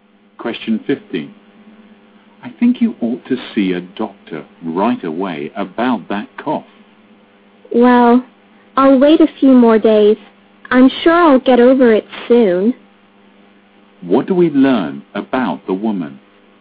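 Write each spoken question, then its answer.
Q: What do we learn about the woman?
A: She doesn't think her cough is serious and won't see a doctor yet.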